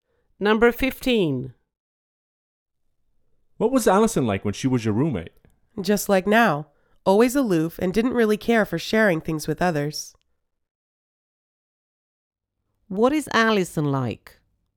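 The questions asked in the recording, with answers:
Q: What is Allison like?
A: Aloof and unwilling to share.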